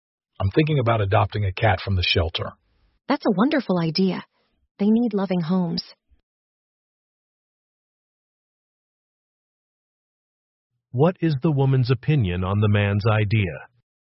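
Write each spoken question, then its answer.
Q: What is the woman's opinion on the man's idea?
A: She thinks adopting a cat is a wonderful idea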